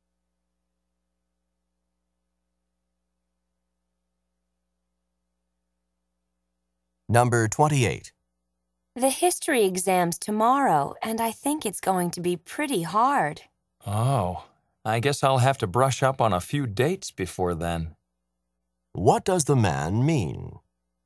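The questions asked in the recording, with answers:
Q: What does the man mean?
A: He needs to review some dates for the exam.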